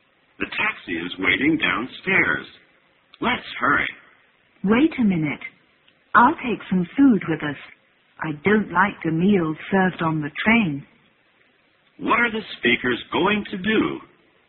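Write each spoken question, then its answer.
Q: What are the speakers going to do?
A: Take a taxi to catch a train (go on a train trip).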